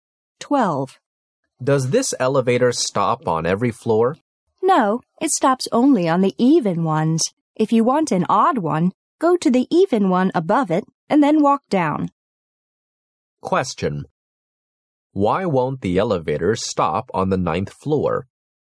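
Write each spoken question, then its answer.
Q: Why won't the elevator stop on the 9th floor?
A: It stops only on even-numbered floors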